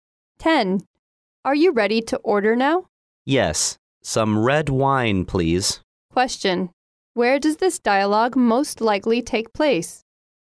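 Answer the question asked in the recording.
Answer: In a restaurant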